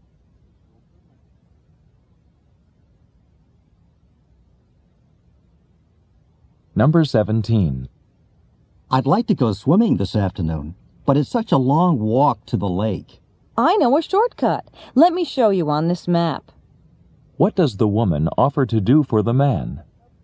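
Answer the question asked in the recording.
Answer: Show him a shortcut to the lake on a map.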